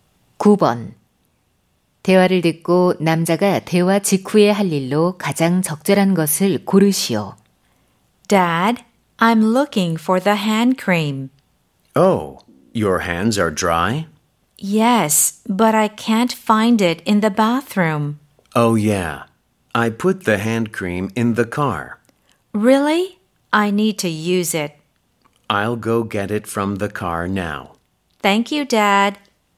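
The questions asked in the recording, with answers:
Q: 대화를 듣고 남자가 대화 직후에 할 일로 가장 적절한 것을 고르시오.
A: 차에서 핸드크림 가져오기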